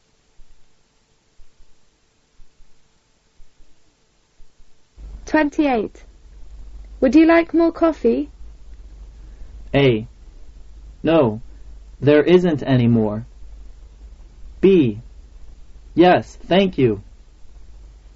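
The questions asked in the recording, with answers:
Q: Would you like more coffee?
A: B: Yes, thank you.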